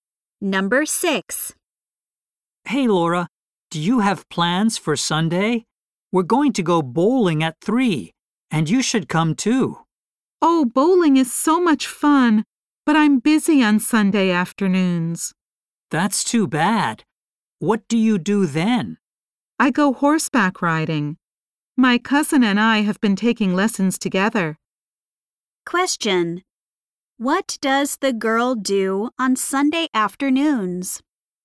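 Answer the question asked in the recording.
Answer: Takes horseback riding lessons.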